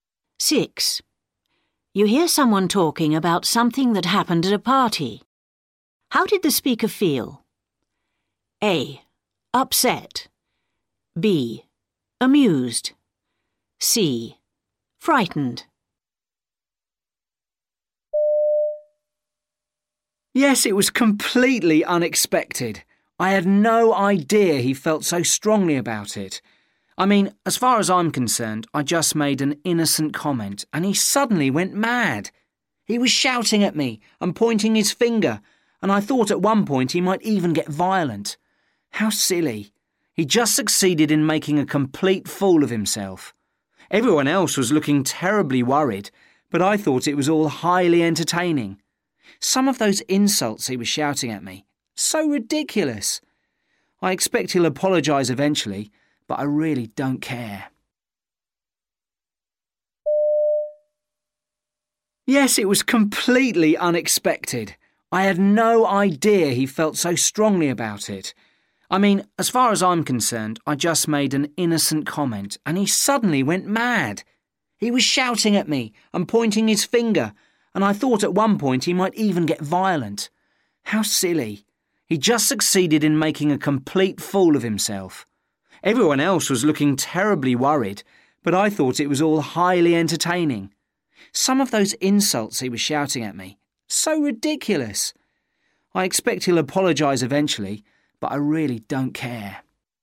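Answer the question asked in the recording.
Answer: B: Amused.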